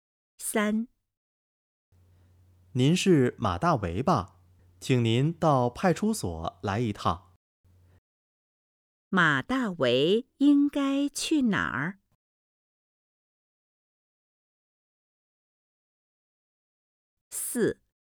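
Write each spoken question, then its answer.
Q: 马大为应该去哪儿?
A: 派出所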